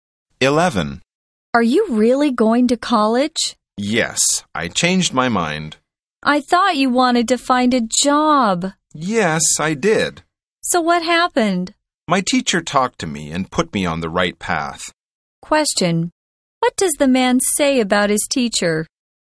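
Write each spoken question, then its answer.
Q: What does the man say about his teacher?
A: His teacher talked to him and put him on the right path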